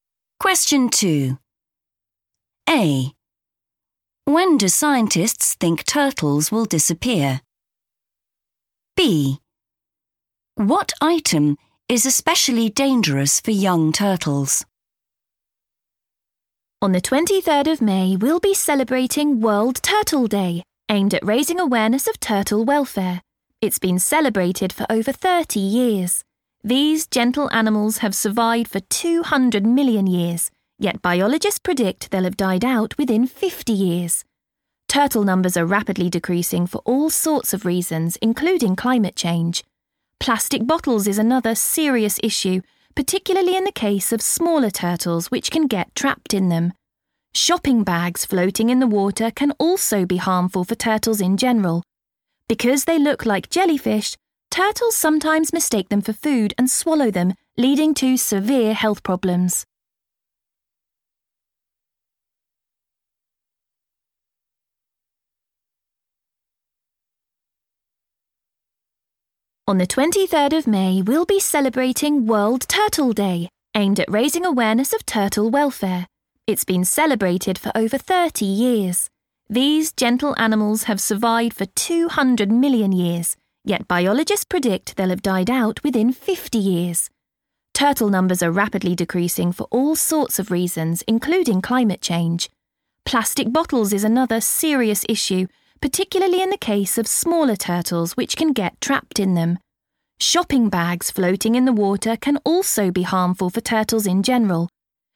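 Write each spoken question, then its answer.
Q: When do scientists think turtles will disappear?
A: within 50 years

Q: What item is especially dangerous for young turtles?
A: plastic bottles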